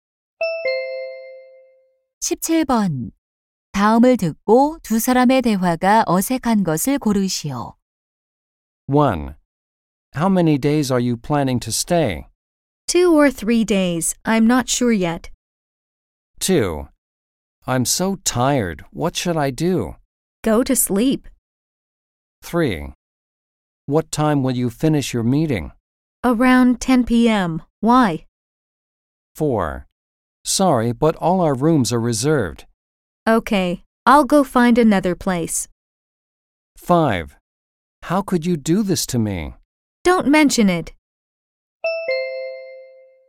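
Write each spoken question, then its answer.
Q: 다음을 듣고 두 사람의 대화가 어색한 것을 고르시오.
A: 5: How could you do this to me? Don't mention it.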